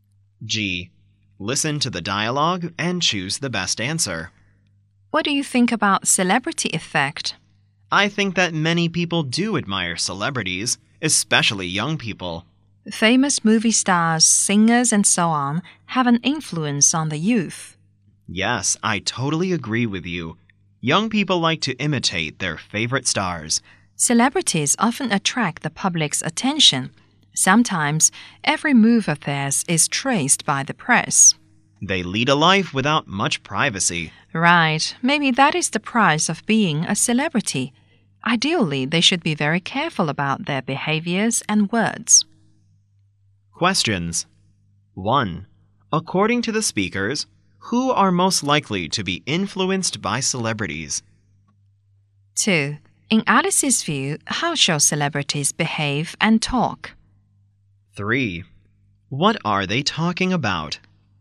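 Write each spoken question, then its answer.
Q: According to the speakers, who are most likely to be influenced by celebrities?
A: Young people

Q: In Alice's view, how shall celebrities behave and talk?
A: Very carefully

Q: What are they talking about?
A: The celebrity effect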